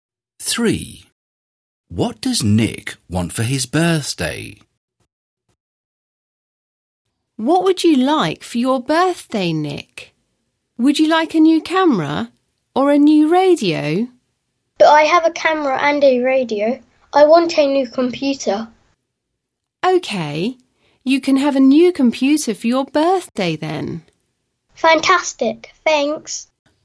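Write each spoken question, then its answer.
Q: What does Nick want for his birthday?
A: A new computer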